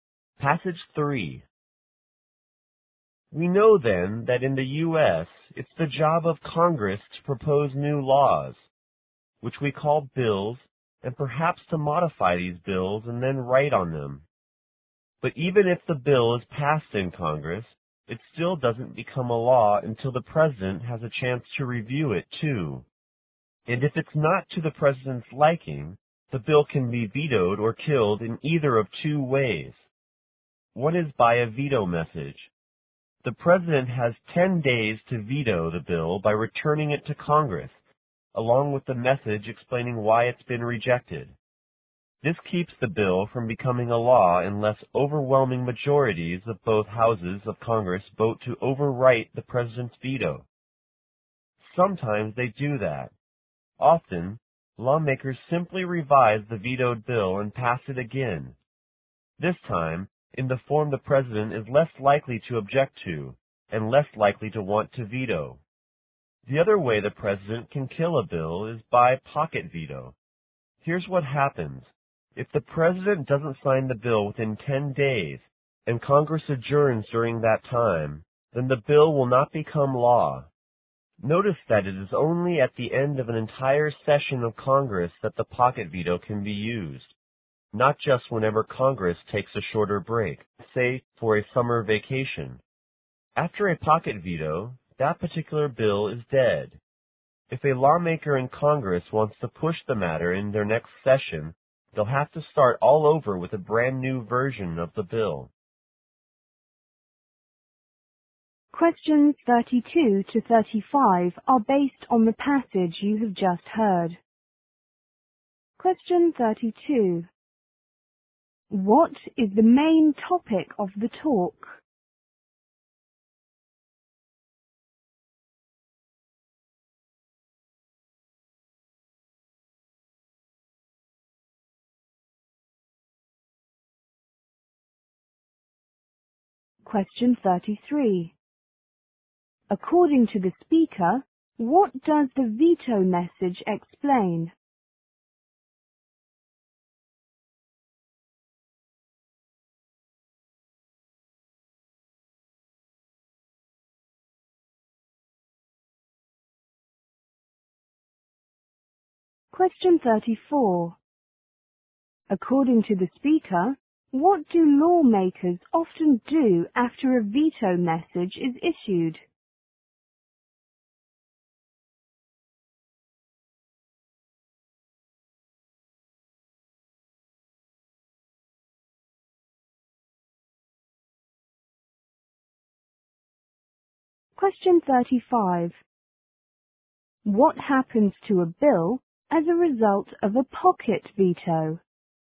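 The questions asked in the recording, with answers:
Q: What is the main topic of the talk?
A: How the president can veto a bill

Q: According to the speaker, what does the veto message explain?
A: Why the bill was rejected

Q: According to the speaker, what do lawmakers often do after a veto message is issued?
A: They revise the bill and pass it again.

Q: What happens to a bill as a result of a pocket veto?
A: The bill is dead and must be started over as a new bill.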